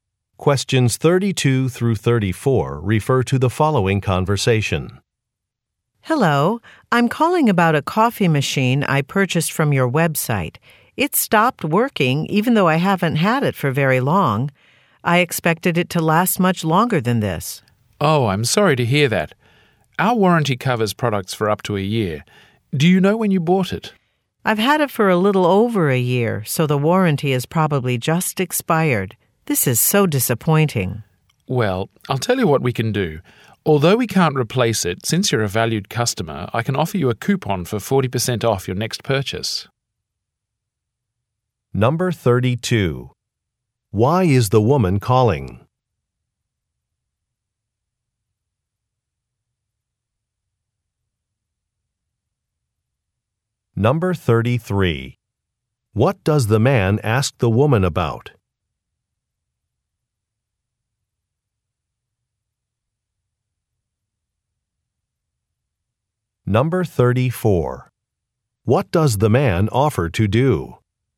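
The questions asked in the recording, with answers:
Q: Why is the woman calling?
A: Her coffee machine stopped working

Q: What does the man ask the woman about?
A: When she bought the coffee machine

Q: What does the man offer to do?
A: Give her a coupon for 40% off her next purchase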